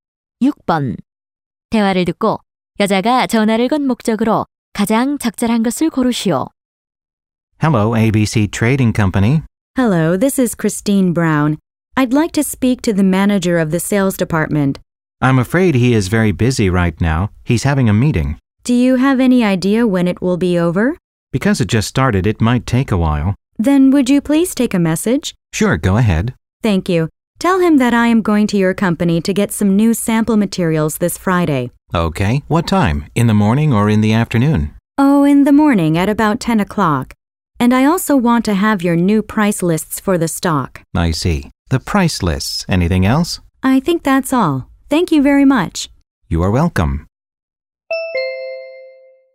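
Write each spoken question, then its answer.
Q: 대화를 듣고 여자가 전화를 건 목적으로 가장 적절한 것을 고르시오.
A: 매니저에게 메시지를 남기기 위해 (금요일 방문 알림)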